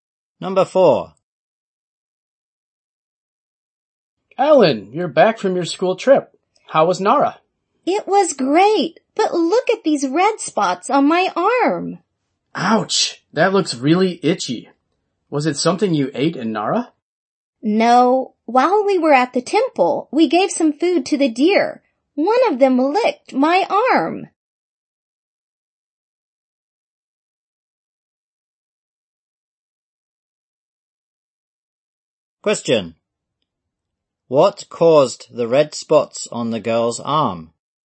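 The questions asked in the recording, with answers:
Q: What caused the red spots on the girl's arm?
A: A deer licked her arm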